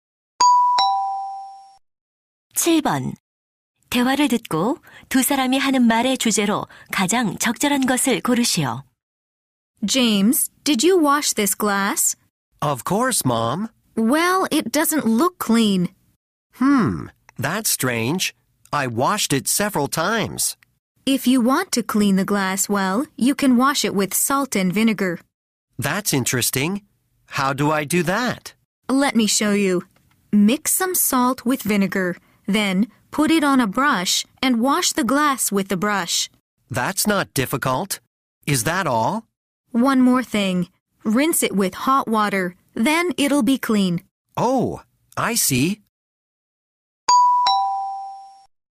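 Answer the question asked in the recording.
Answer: 소금과 식초로 유리컵을 깨끗이 닦는 방법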